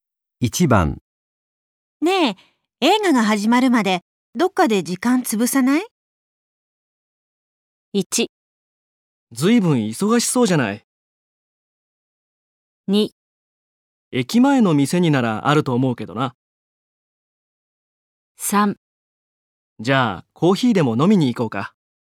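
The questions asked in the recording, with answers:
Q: ねえ、映画が始まるまでどっかで時間潰さない?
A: 3: じゃあコーヒーでも飲みに行こうか。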